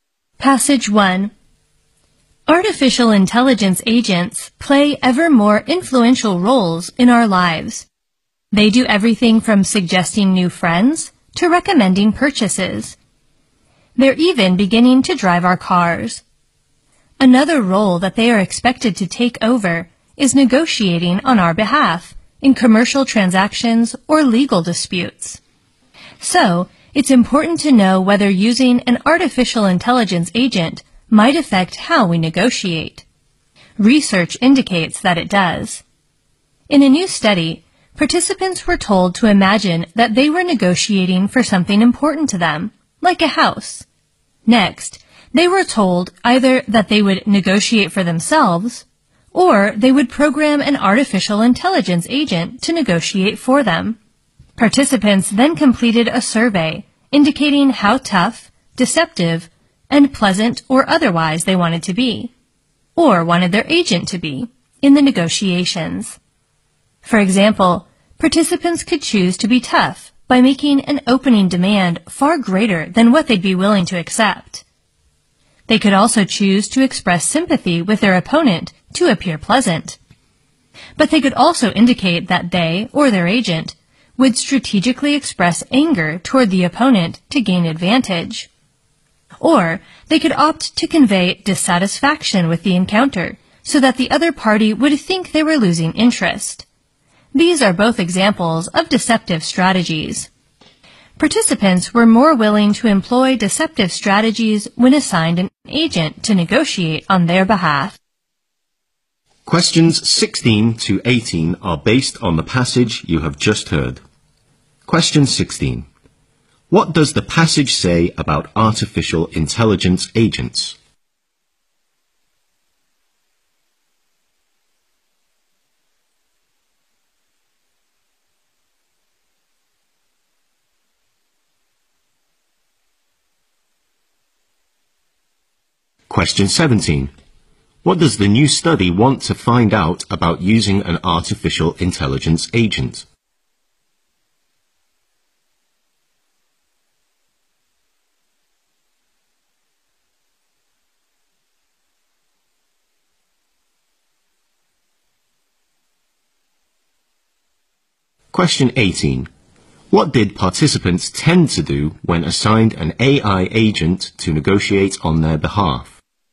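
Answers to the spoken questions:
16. They play ever more influential roles in our lives.
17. Whether it affects how we negotiate.
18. Use deceptive strategies more willingly.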